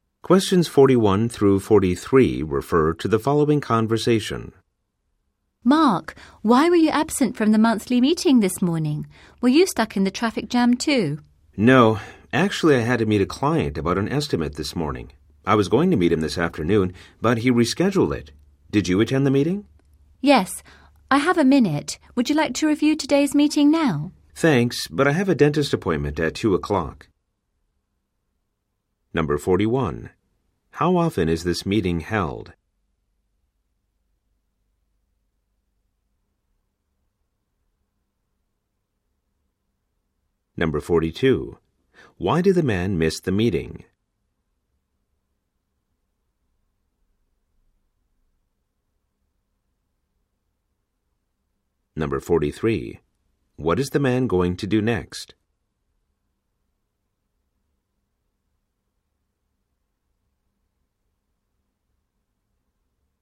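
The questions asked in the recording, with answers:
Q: How often is this meeting held?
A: Once a month (monthly)

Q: Why did the man miss the meeting?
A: He had to meet a client about an estimate

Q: What is the man going to do next?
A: Go to a dentist appointment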